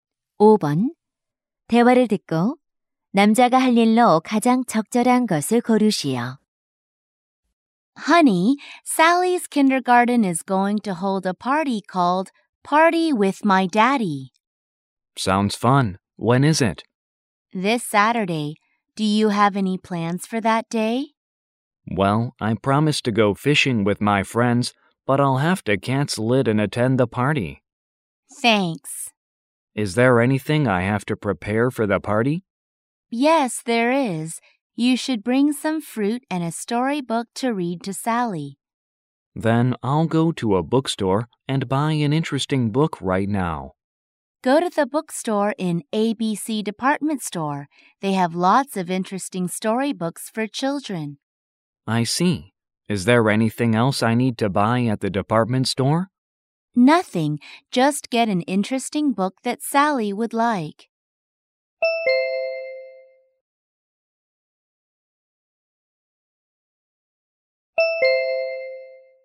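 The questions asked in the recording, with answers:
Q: 대화를 듣고 남자가 할 일로 가장 적절한 것을 고르시오.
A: 서점에 가서 동화책 사기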